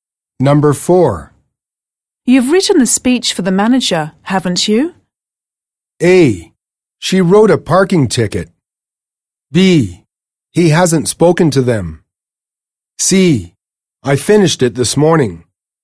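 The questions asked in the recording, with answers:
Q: You've written the speech for the manager, haven't you?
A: C: I finished it this morning.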